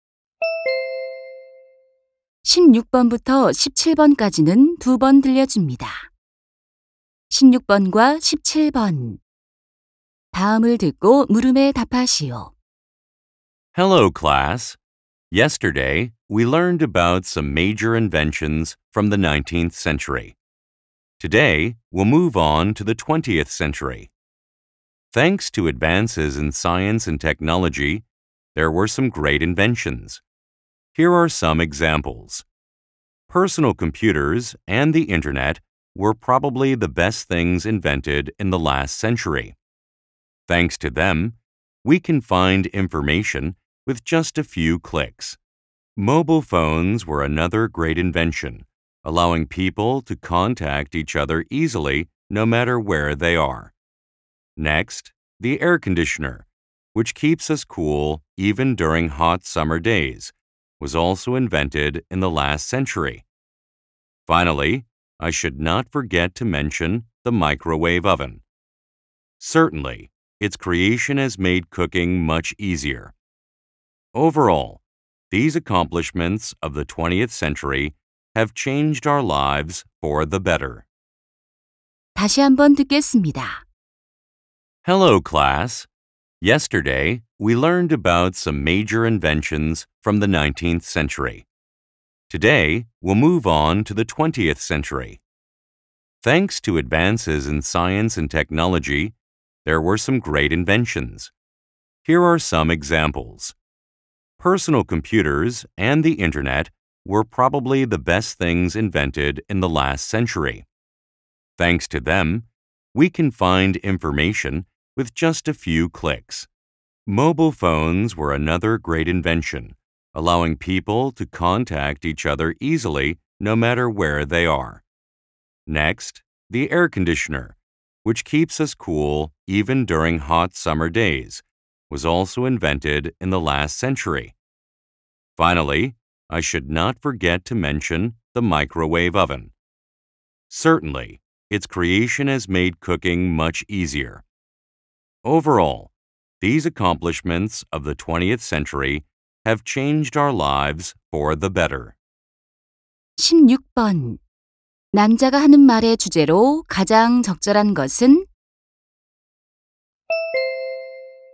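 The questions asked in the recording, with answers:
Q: 남자가 하는 말의 주제로 가장 적절한 것은?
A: 우리의 삶을 바꾼 20세기의 주요 발명품들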